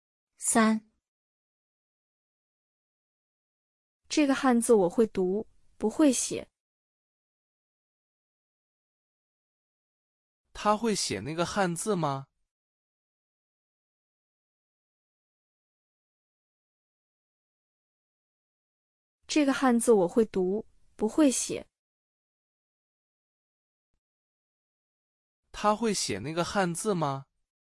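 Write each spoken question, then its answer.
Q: 他会写那个汉字吗?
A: 不会写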